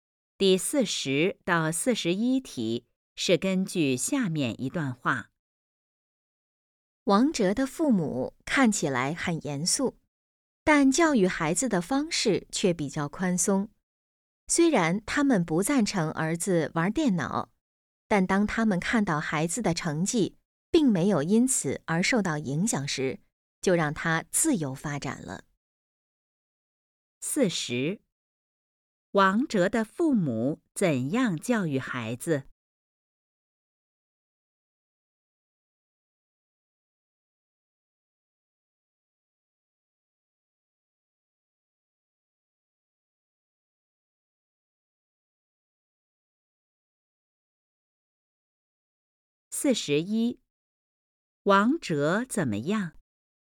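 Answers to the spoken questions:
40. 方式比较宽松
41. 喜欢玩电脑,但成绩没受影响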